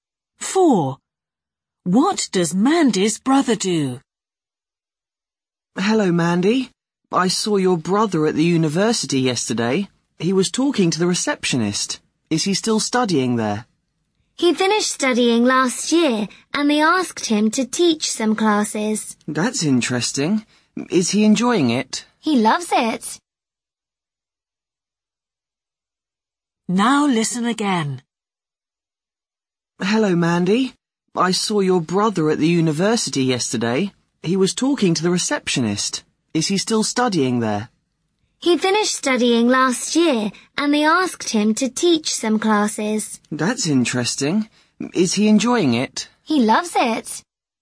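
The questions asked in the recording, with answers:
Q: What does Mandy's brother do?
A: He teaches classes at the university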